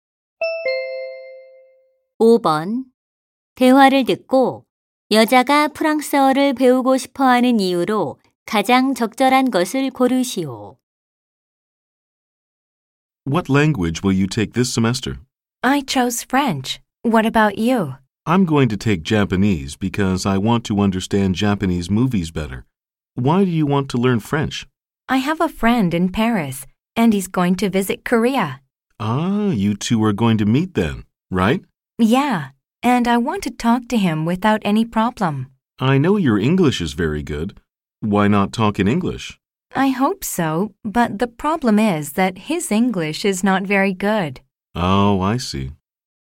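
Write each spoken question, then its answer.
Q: 대화를 듣고 여자가 프랑스어를 배우고 싶어 하는 이유로 가장 적절한 것을 고르시오.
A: 한국에 오는 파리 친구와 문제없이 대화하고 싶어서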